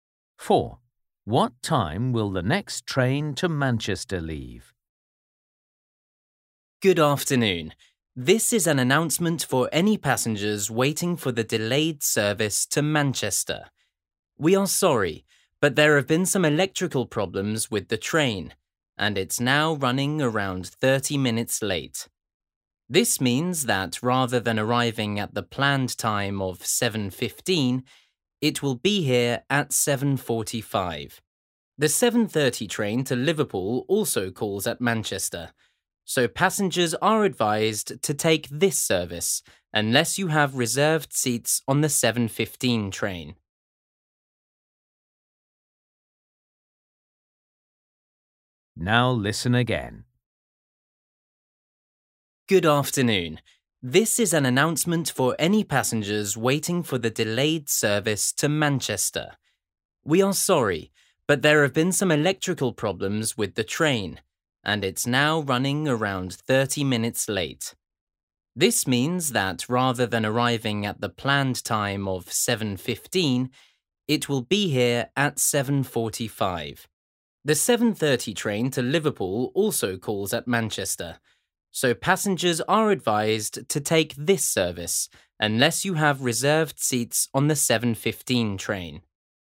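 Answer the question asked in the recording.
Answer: 7:30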